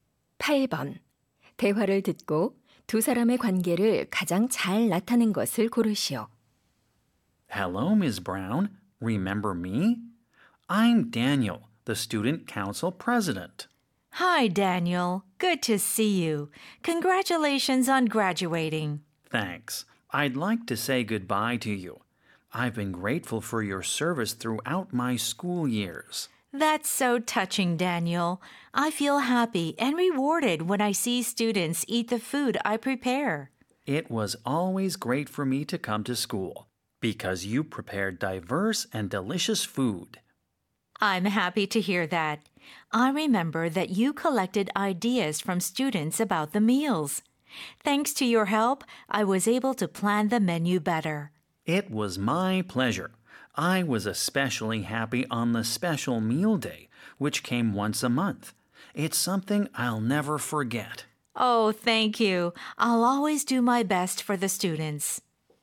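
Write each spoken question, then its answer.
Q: 대화를 듣고 두 사람의 관계를 가장 잘 나타낸 것을 고르시오.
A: 학생 - 학교 급식 담당자(영양사)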